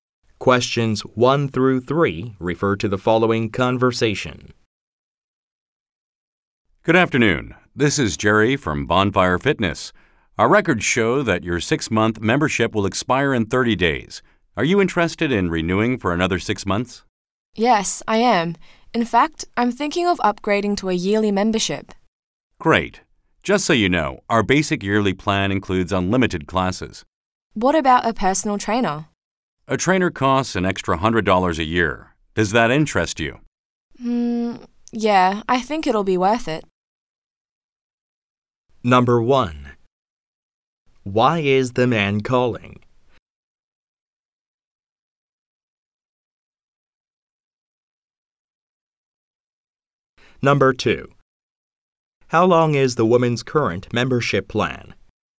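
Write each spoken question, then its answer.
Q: Why is the man calling?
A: To ask about renewing her gym membership

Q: How long is the woman's current membership plan?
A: 6 months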